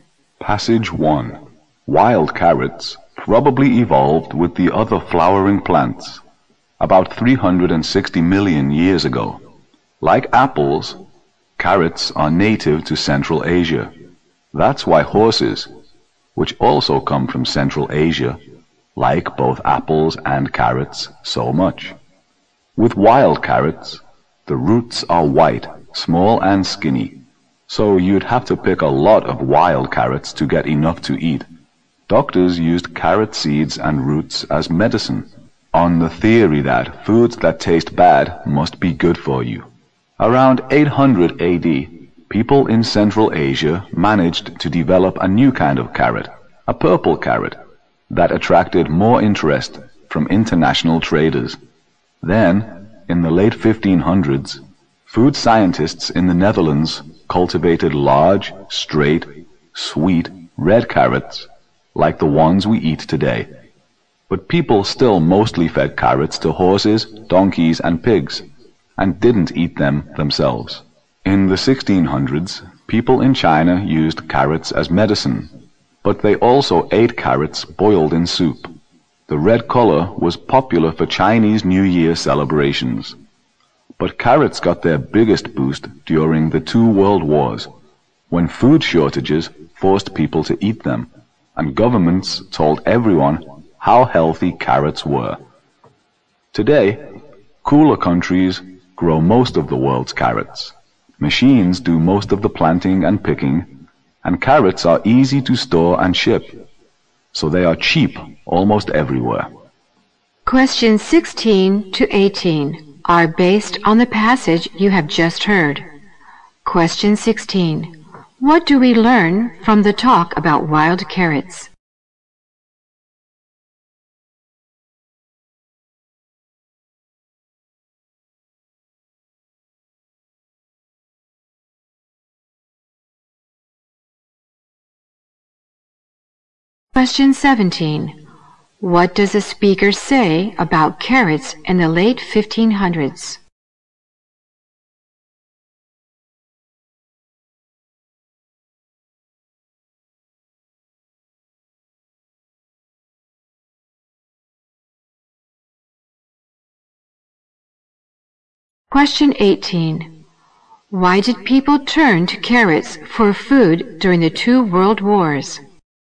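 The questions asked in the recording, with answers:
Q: What does a speaker say about carrots in the late 1500s?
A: Dutch food scientists cultivated large, straight, sweet red carrots

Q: Why did people turn to carrots for food during the two world wars?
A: Food shortages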